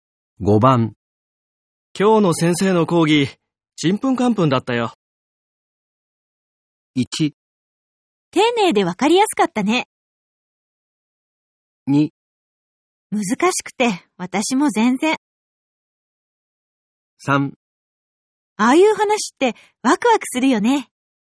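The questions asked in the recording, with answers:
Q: 今日の先生の講義、ちんぷんかんぷんだったよ。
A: 2: 難しくて、私も全然。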